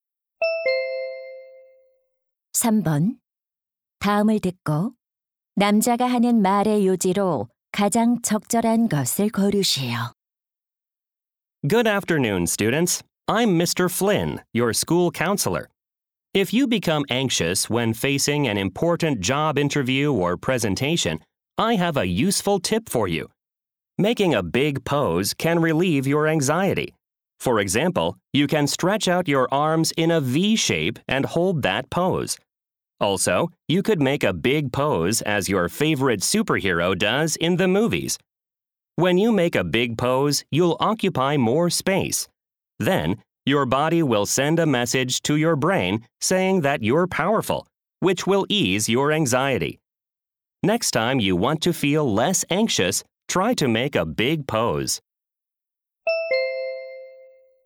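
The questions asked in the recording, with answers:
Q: 다음을 듣고 남자가 하는 말의 요지로 가장 적절한 것을 고르시오.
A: 큰 자세를 취하면 불안을 줄일 수 있다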